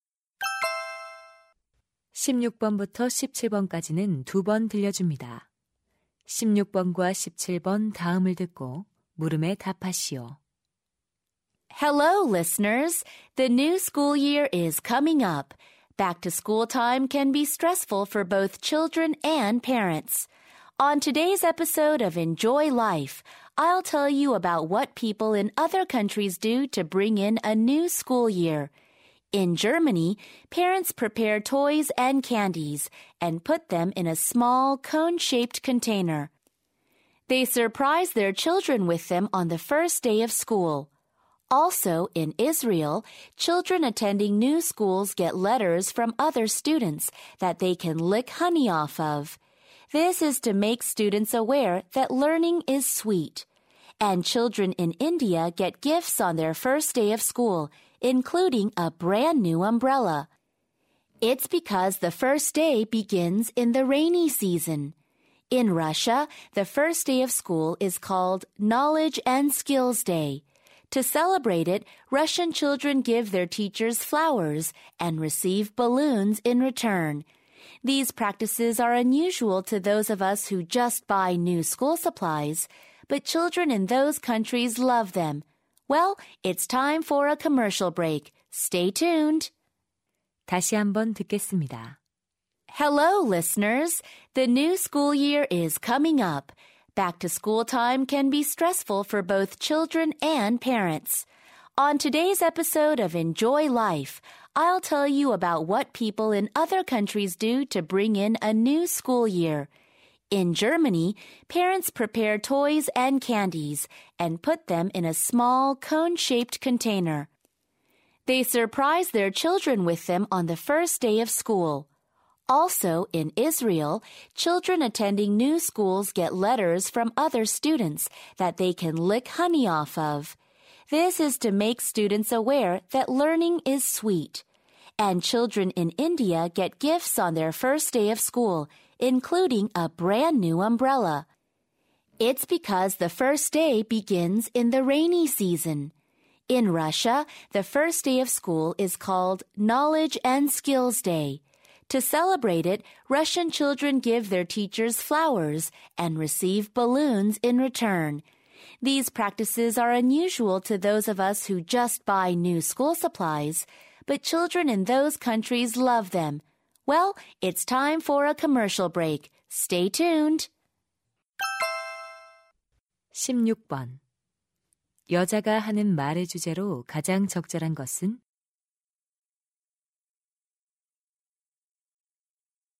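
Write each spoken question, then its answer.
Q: 여자가 하는 말의 주제로 가장 적절한 것은?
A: 여러 나라에서 새 학년 첫날을 맞이하는 풍습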